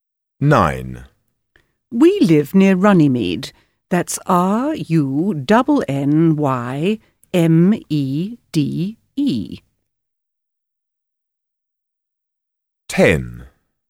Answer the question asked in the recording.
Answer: Runnymede